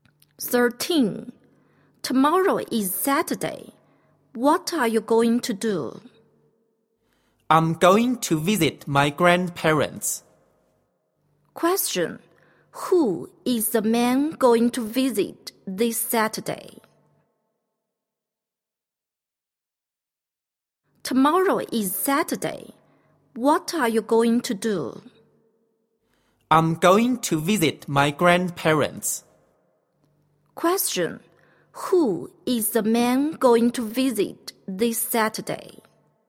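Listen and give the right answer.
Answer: His grandparents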